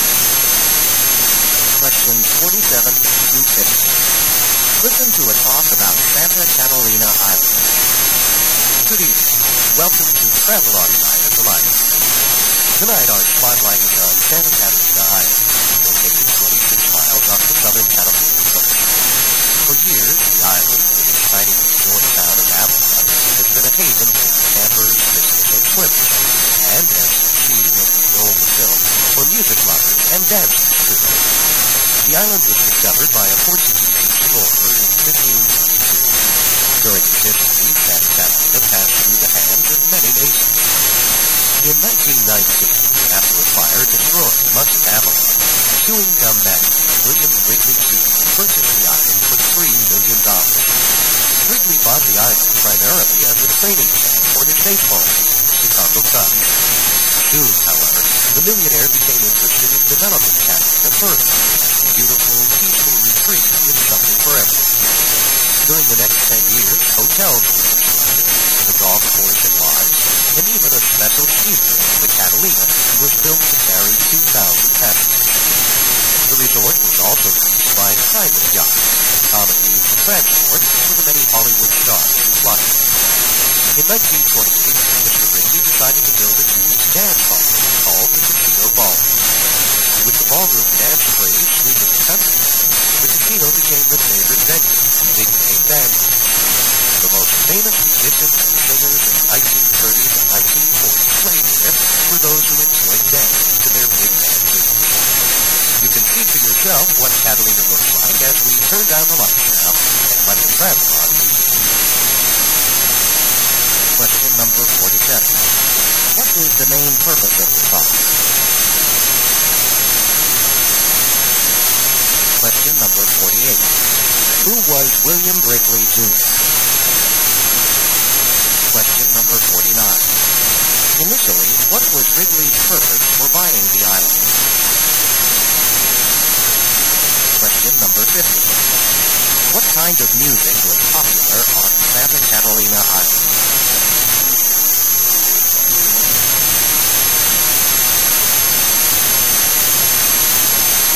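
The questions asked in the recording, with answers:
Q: What is the main purpose of the song?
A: To introduce a travel film about Santa Catalina Island

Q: Who was William Wrigley Jr.?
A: A chewing gum magnate who bought the island

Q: Initially, what was Wrigley's purpose for buying the island?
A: As a training camp for his baseball team, the Chicago Cubs

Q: What kind of music was popular on Santa Catalina Island?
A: Big band music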